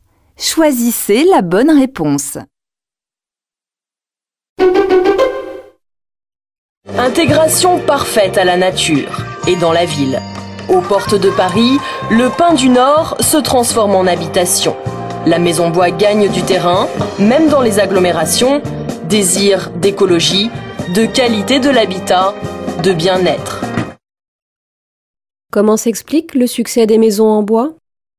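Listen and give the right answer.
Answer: Par un désir d'écologie, de qualité de l'habitat et de bien-être.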